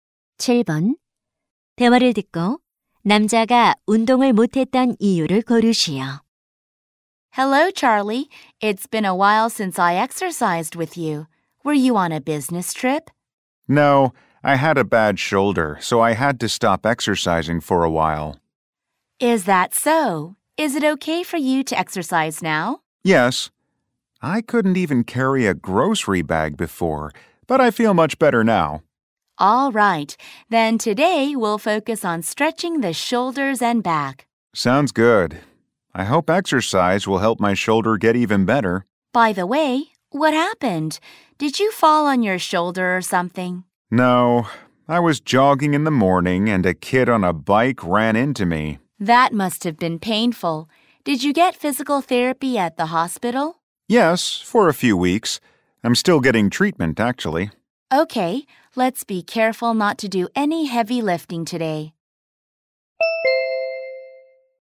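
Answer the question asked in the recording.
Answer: 자전거와 부딪혀 어깨를 다쳐서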